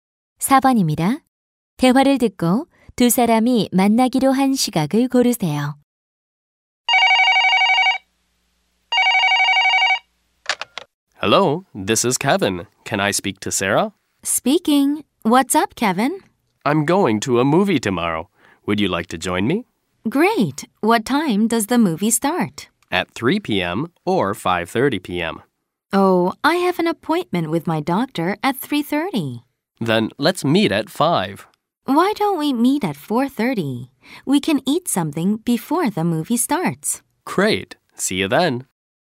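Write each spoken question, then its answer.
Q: 대화를 듣고 두 사람이 만나기로 한 시각을 고르세요.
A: 4시 30분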